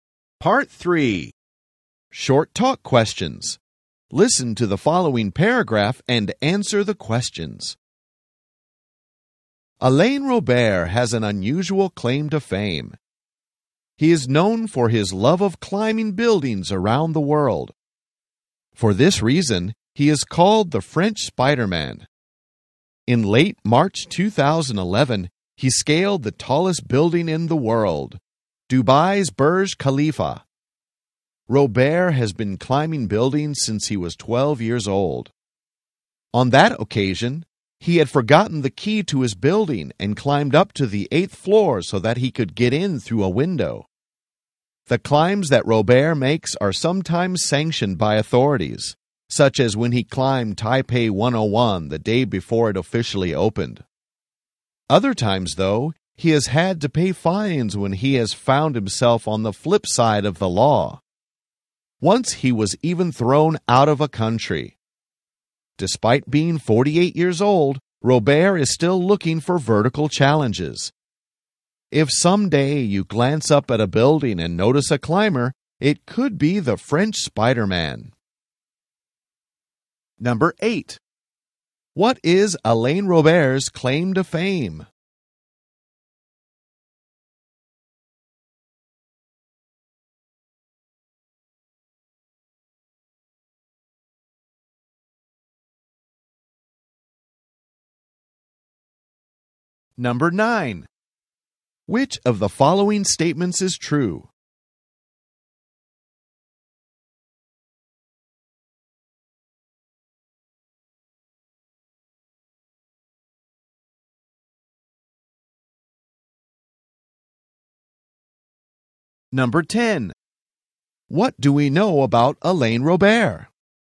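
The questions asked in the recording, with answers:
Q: What is Alain Robert's claim to fame?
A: Climbing buildings around the world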